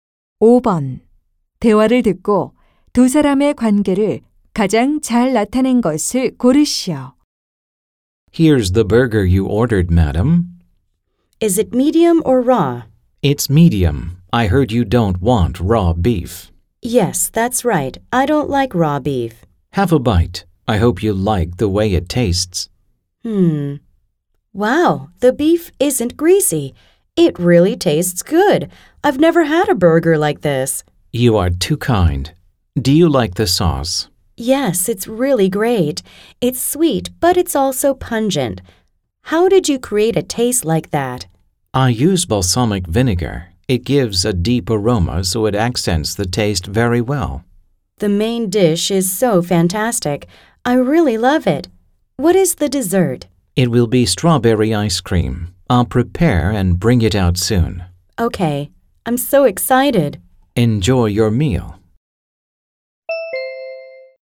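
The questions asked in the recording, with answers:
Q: 대화를 듣고 두 사람의 관계를 가장 잘 나타낸 것을 고르시오.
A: 요리사 - 손님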